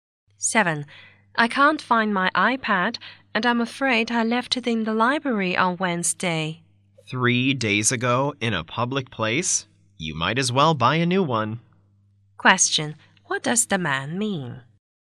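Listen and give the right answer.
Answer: She is unlikely to get her iPad back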